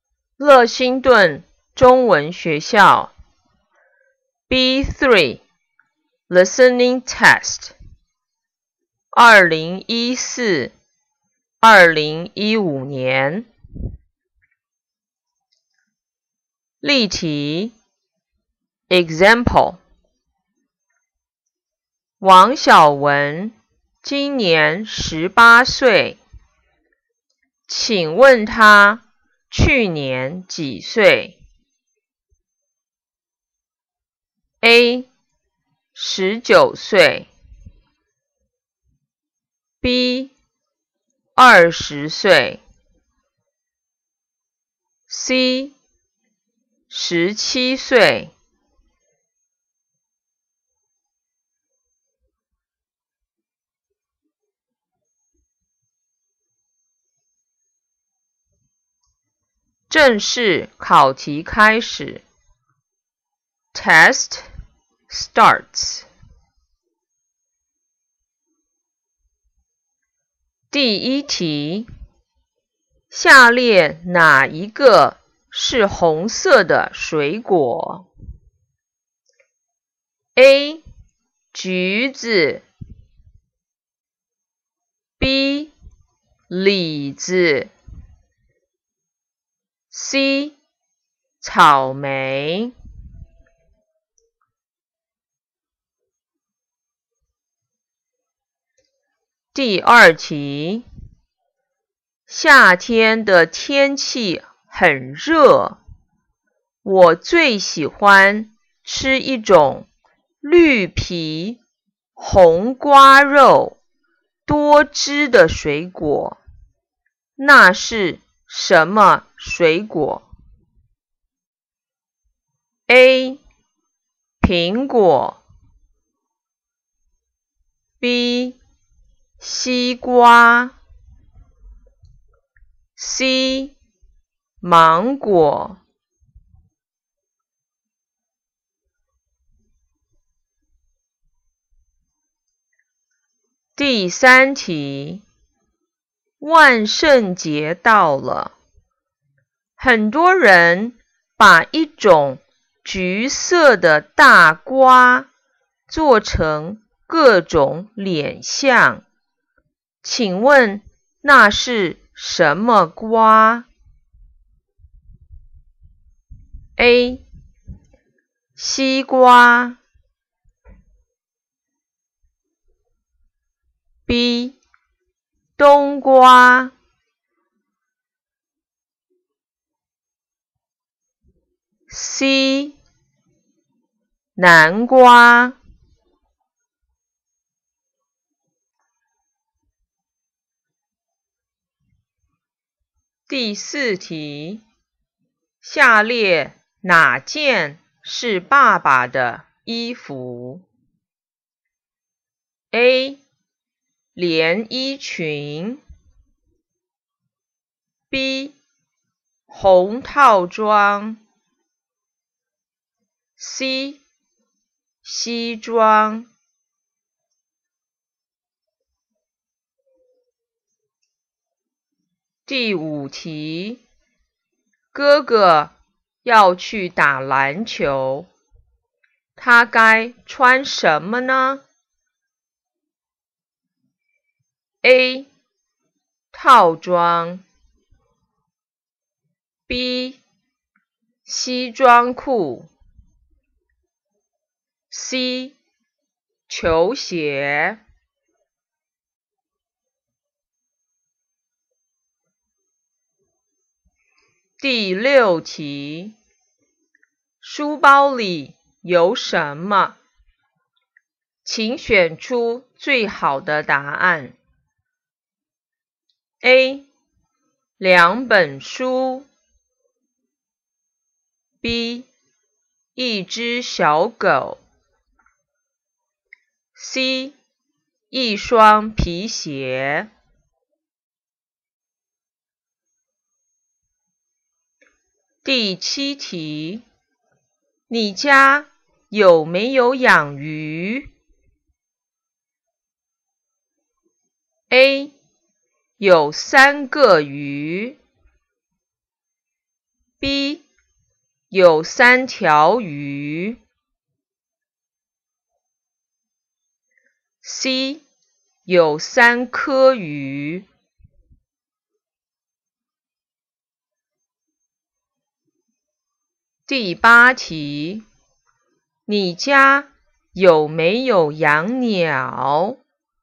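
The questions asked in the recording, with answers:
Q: 下列哪一个是红色的水果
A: C: 草莓

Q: 夏天的天气很热我最喜欢吃一种绿皮红瓜肉多汁的水果那是什么水果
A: B: 西瓜

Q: 请问那是什么瓜 ?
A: C: 南瓜

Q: 下列哪件是爸爸的衣服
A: C: 西装

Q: 哥哥要去打篮球他该穿什么呢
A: C: 球鞋

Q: 书包里有什么请选出最好的答案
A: A: 两本书

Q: 你家有没有养鱼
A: B: 有三条鱼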